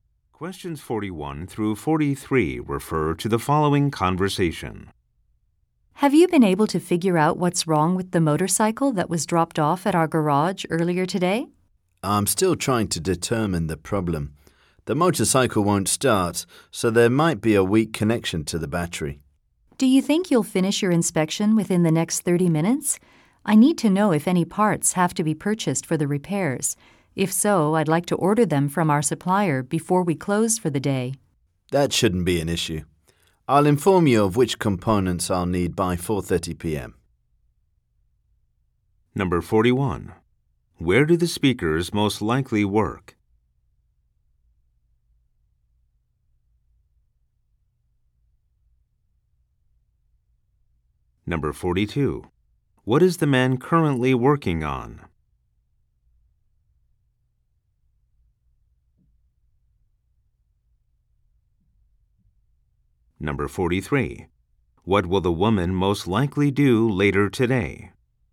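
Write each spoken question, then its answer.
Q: Where do the speakers most likely work?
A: At a garage

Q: What is the man currently working on?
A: Inspecting a motorcycle that won't start

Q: What will the woman most likely do later today?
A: Order parts from the supplier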